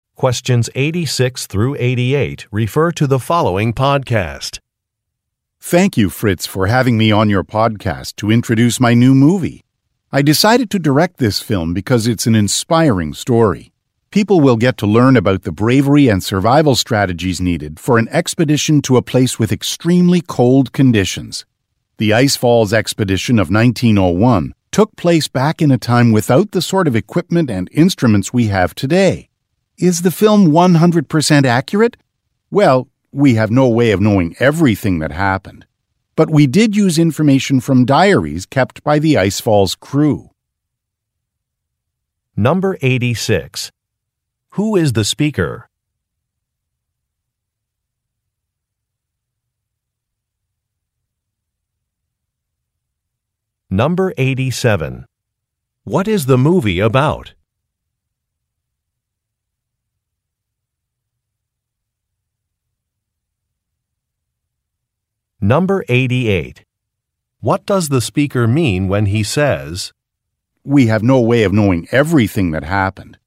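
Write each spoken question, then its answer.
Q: Who is the speaker?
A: A film director

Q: What is the movie about?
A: A historic expedition to an extremely cold place (the Ice Falls Expedition of 1901)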